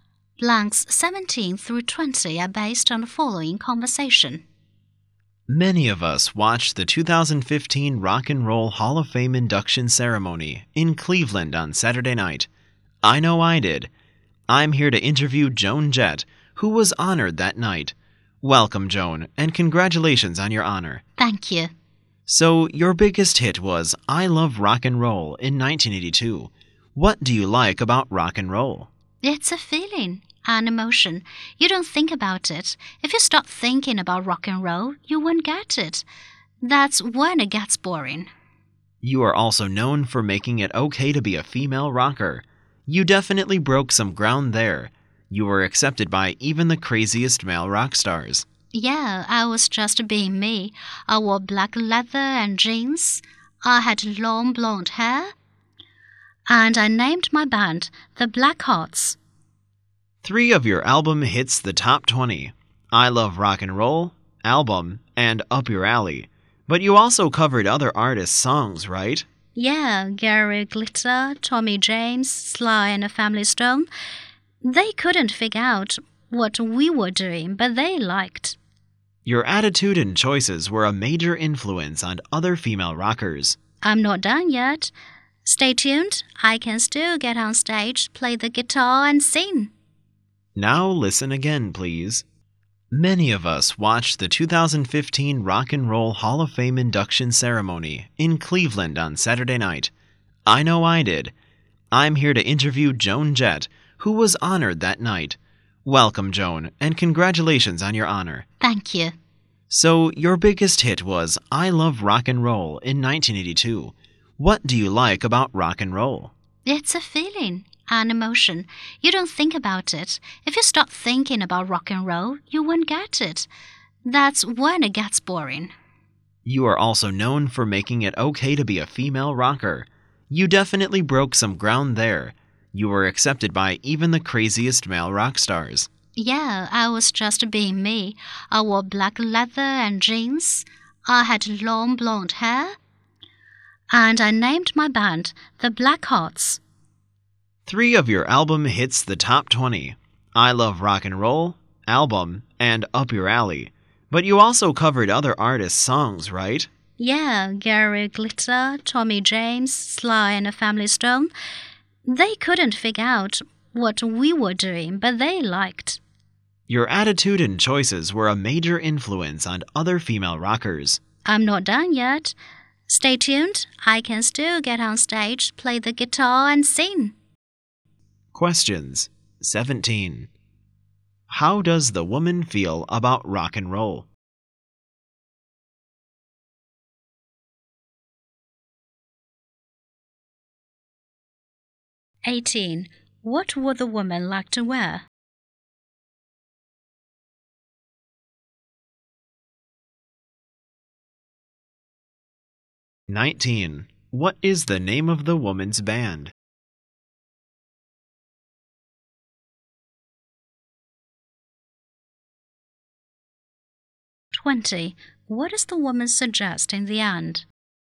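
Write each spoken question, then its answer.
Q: How does the woman feel about rock and roll?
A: It's a feeling, an emotion

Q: What would the woman like to wear?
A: Black leather and jeans

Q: What is the name of the woman's band?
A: The Blackhearts

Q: What does the woman suggest in the end?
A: She isn't done yet and will keep performing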